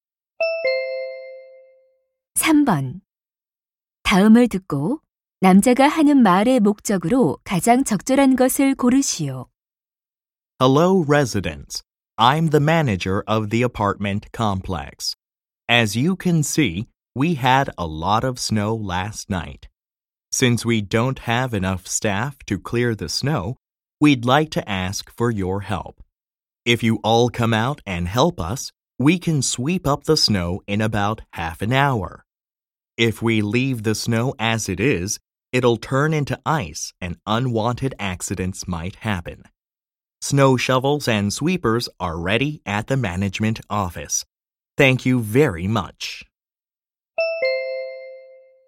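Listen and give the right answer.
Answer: 주민들에게 눈 치우는 일을 도와 달라고 요청하려고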